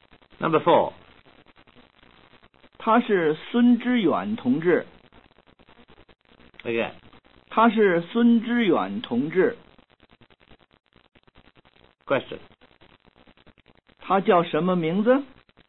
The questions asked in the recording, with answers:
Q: 她叫什么名字?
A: 她叫知远.